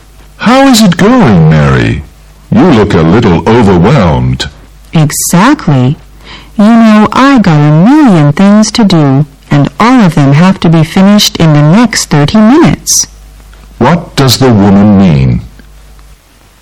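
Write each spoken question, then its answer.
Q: What does the woman mean?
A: She is very busy with too much to do.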